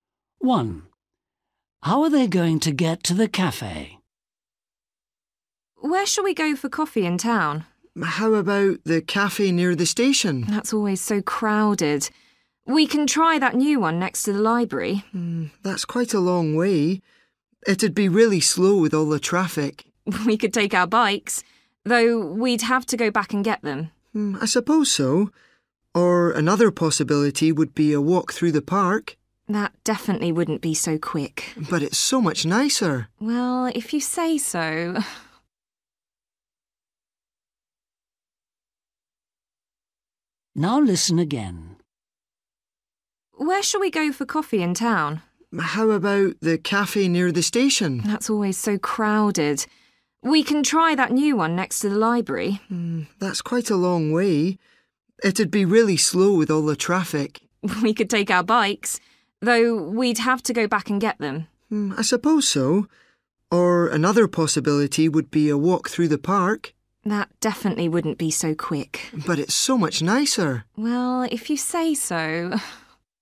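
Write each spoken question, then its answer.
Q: How are they going to get to the cafe?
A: walk through the park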